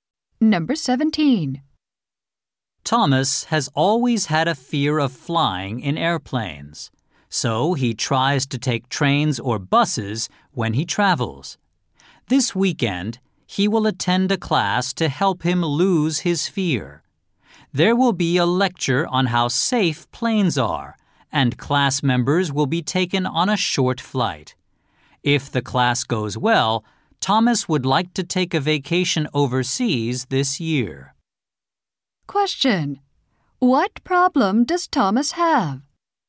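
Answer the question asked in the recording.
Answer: He is afraid of flying.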